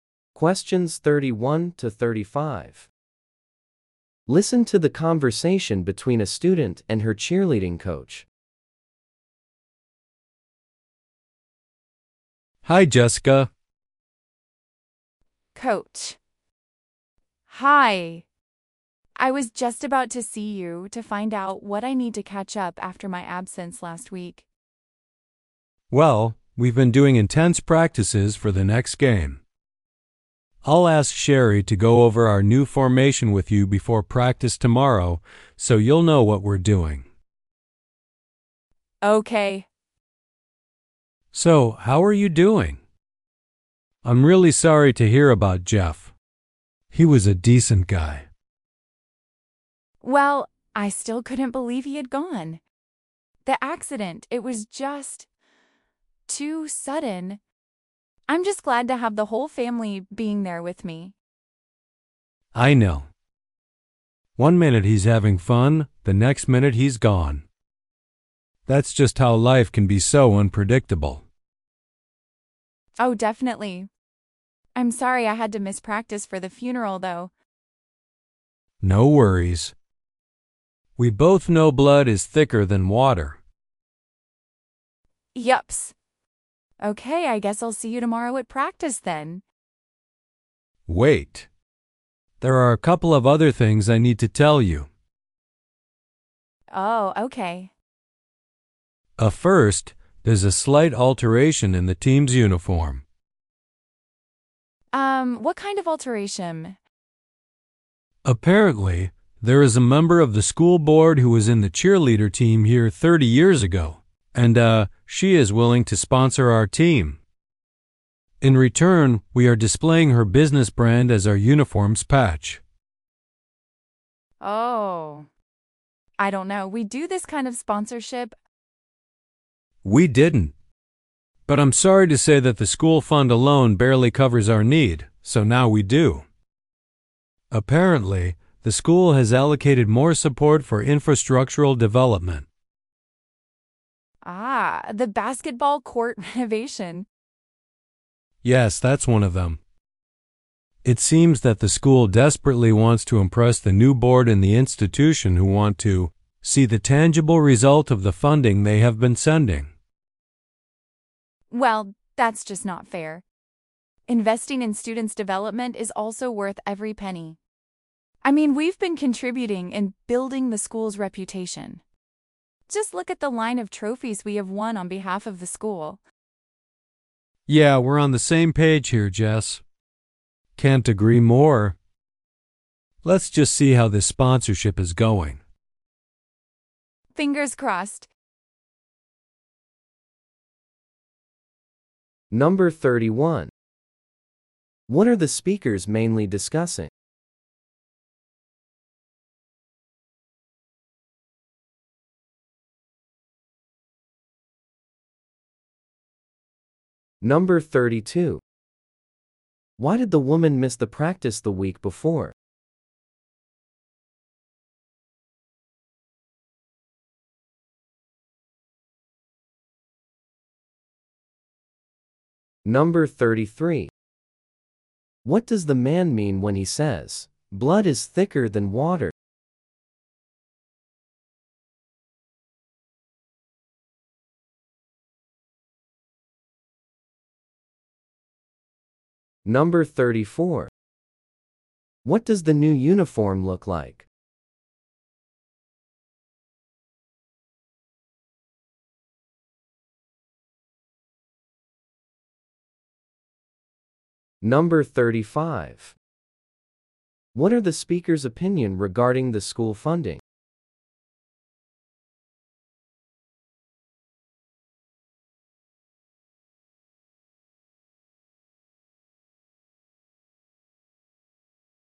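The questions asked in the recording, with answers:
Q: Why did the woman miss the practice the week before?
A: She went to Jeff's funeral.

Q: What does the man mean when he says, "Blood is thicker than water"?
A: Family comes first.

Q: What does the new uniform look like?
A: It has the sponsor's business brand as a patch.

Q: What are the speaker's opinion regarding the school funding?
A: It is unfair; students' development also deserves funding.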